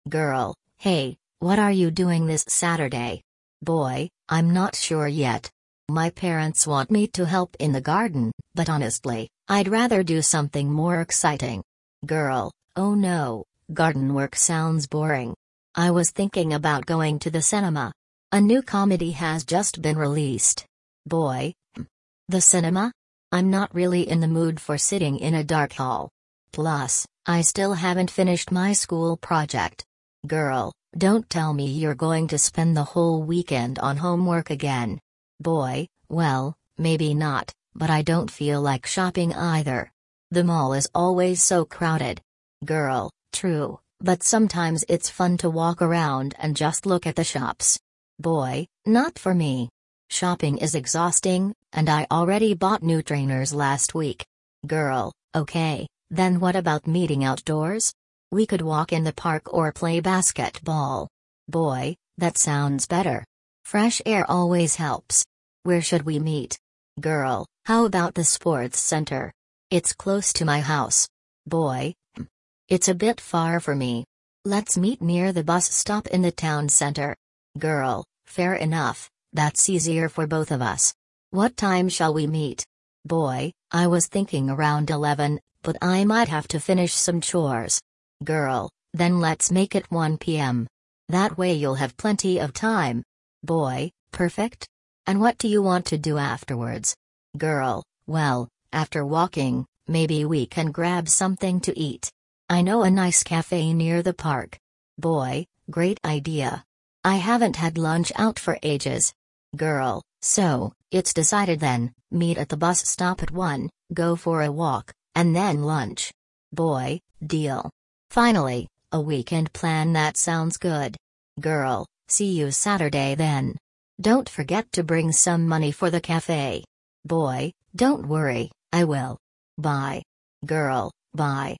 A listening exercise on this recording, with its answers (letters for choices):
You will hear a dialogue between two friends discussing their weekend plans. For questions A–E, choose the correct answer (1, 2 or 3).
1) What is the girl's main plan for Saturday?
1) To go to the cinema.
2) To help her parents in the garden.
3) To do her homework.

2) Why doesn't the boy want to go shopping?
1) He doesn't like crowded places.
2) He has already bought everything he needs.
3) He prefers to spend time outdoors.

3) Where do they finally decide to meet?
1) At the sports centre.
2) Near the bus stop.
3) At the boy's house.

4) What time will they meet?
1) At 10 am.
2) At 11 am.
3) At 1 pm.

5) What do they agree to do after their meeting?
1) Have lunch in a café.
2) Go to the library.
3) Watch a football match.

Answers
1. 1
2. 1
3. 2
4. 3
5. 1

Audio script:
Girl: Hey, what are you doing this Saturday?
Boy: I'm not sure yet. My parents want me to help in the garden, but honestly, I'd rather do something more exciting.
Girl: Oh no, garden work sounds boring. I was thinking about going to the cinema. A new comedy has just been released.
Boy: Hmm, the cinema? I'm not really in the mood for sitting in a dark hall. Plus, I still haven't finished my school project.
Girl: Don't tell me you're going to spend the whole weekend on homework again!
Boy: Well, maybe not, but I don't feel like shopping either. The mall is always so crowded.
Girl: True, but sometimes it's fun to walk around and just look at the shops.
Boy: Not for me. Shopping is exhausting, and I already bought new trainers last week.
Girl: Okay, then what about meeting outdoors? We could walk in the park or play basketball.
Boy: That sounds better. Fresh air always helps. Where should we meet?
Girl: How about the sports centre? It's close to my house.
Boy: Hmm, it's a bit far for me. Let's meet near the bus stop in the town centre.
Girl: Fair enough, that's easier for both of us. What time shall we meet?
Boy: I was thinking around 11, but I might have to finish some chores.
Girl: Then let's make it 1 pm. That way you'll have plenty of time.
Boy: Perfect. And what do you want to do afterwards?
Girl: Well, after walking, maybe we can grab something to eat. I know a nice café near the park.
Boy: Great idea! I haven't had lunch out for ages.
Girl: So, it's decided then — meet at the bus stop at 1, go for a walk, and then lunch.
Boy: Deal! Finally, a weekend plan that sounds good.
Girl: See you Saturday then. Don't forget to bring some money for the café.
Boy: Don't worry, I will. Bye!
Girl: Bye!